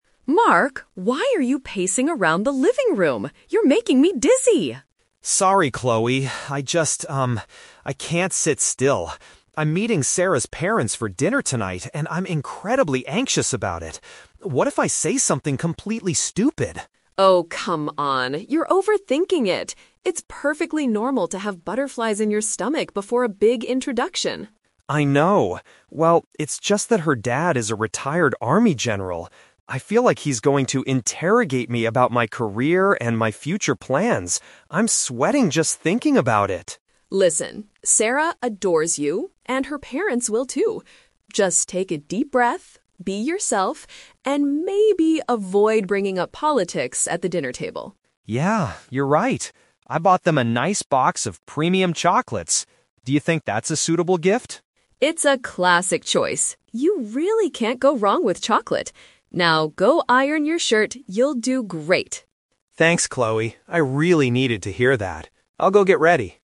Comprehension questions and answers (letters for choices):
Listen to the conversation between a brother and sister. Choose the correct answer (A, B, or C) for each question.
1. Why is Mark feeling so nervous today?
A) He is preparing for a difficult job interview.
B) He is going to be introduced to his girlfriend's family.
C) He is worried about his health because he feels dizzy.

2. What is Mark's specific worry regarding Sarah's father?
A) He fears the father will ask strict questions about his life.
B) He is afraid the father will talk about politics all night.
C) He thinks the father will dislike his gift of chocolates.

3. What does Chloe suggest Mark should do?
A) Buy a different present that is more expensive.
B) Cancel the dinner if he feels too anxious.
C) Act naturally and avoid controversial topics.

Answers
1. B
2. A
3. C

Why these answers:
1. Mark says, "I'm meeting Sarah's parents for dinner tonight." Option B is a perfect paraphrase of this event. The Trap (A): Mark mentions Sarah's dad is a "retired army general" and will "interrogate me about my career," which sounds like an interview, but it is a family dinner, not a real job interview. The Trap (C): The word "dizzy" is in the audio, but it is Chloe who feels dizzy because Mark is walking in circles, not Mark.
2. Mark says he feels the dad is going to "interrogate me about my career and my future plans." To interrogate means to ask strict or aggressive questions. The Trap (B): Chloe advises Mark to "avoid bringing up politics," but Mark never says he is worried the father will talk about it. The Trap (C): They discuss the chocolates at the end, but Chloe says it's a "classic choice." There is no mention of the father disliking them.
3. Chloe tells him to "be yourself" (act naturally) and "avoid bringing up politics" (avoid controversial topics). The Trap (A): The script mentions the gift, but Chloe says "you can't go wrong with chocolate." She agrees with the gift and does not tell him to buy a different one. The Plausible (B): Canceling is a common reaction to anxiety, but Chloe is supportive and tells him "you'll do great," not to cancel.

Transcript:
Chloe: Mark, why are you pacing around the living room? You're making me dizzy.
Mark: Sorry, Chloe. I just... um, I can't sit still. I'm meeting Sarah's parents for dinner tonight, and I'm incredibly anxious about it. What if I say something completely stupid?
Chloe: Oh, come on. You're overthinking it. It's perfectly normal to have butterflies in your stomach before a big introduction.
Mark: I know, well, it's just that her dad is a retired army general. I feel like he's going to interrogate me about my career and my future plans. I'm sweating just thinking about it!
Chloe: Listen, Sarah adores you, and her parents will too. Just take a deep breath, be yourself, and maybe avoid bringing up politics at the dinner table.
Mark: Yeah, you're right. I bought them a nice box of premium chocolates. Do you think that's a suitable gift?
Chloe: It's a classic choice. You really can't go wrong with chocolate. Now, go iron your shirt, you'll do great!